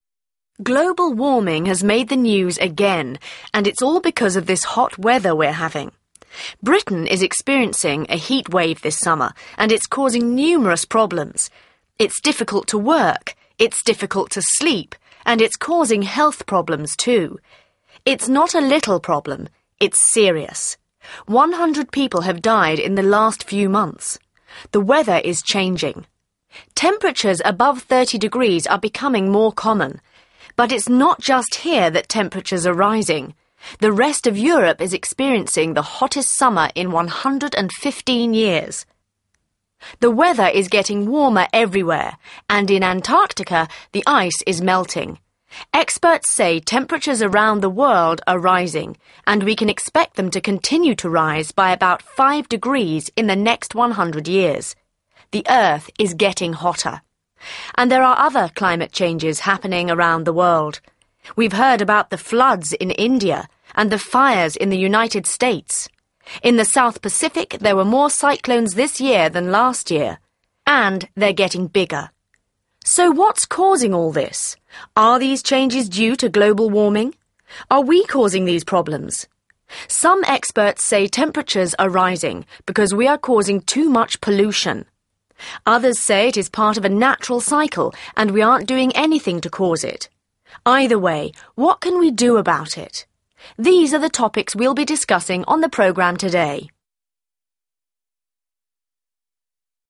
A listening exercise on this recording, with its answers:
3. Listen again and complete these notes.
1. Temperatures above 30°C are becoming more d ____ __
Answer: common

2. Europe is having the hottest summer in e ____ __ years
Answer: 115

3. Temperatures will rise by 5°C in the next f ____ __ years.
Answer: 100

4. g ____ __ in India.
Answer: Floods

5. More h ____ __ in the South Pacific.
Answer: cyclones

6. Temperatures are rising because there is too much i ____ __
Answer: pollution

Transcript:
Global warming has made the news again and it's all because of this hot weather we're having. Britain is experiencing a heat wave this summer and it's causing numerous problems. It's difficult to work. It's difficult to sleep. And it's causing health problems too. It's not a little problem. It's serious. 100 people have died in the last few months. The weather is changing. Temperatures above 30 degrees are becoming more common. But it's not just here that temperatures are rising. The rest of Europe is experiencing the hottest summer in 115 years. The weather is getting warmer everywhere and in Antarctica, the ice is melting. Experts say temperatures around the world are rising and we can expect them to continue to rise by about five degrees in the next 100 years. The earth is getting hotter.
And there are other climate changes happening around the world. We've heard about the floods in India and the fires in the United States. In the South Pacific, there were more cyclones this year than last year. And they're getting bigger.
So what's causing all this? Are these changes due to global warming? Are we causing these problems? Some experts say temperatures are rising because we are causing too much pollution. Others say it is part of a natural cycle and we aren't doing anything to cause it. Either way, what can we do about it? These are the topics we'll be discussing on the programme today.